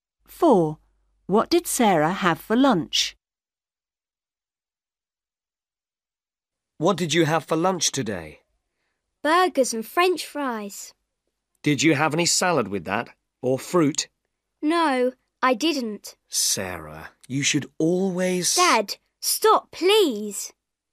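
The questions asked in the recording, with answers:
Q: What did Sarah have for lunch?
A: Burgers and French fries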